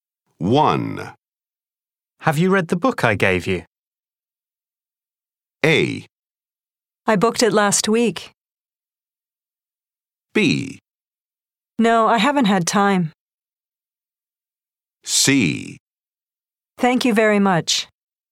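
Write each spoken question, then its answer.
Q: Have you read the book I gave you?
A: B: No, I haven't had time.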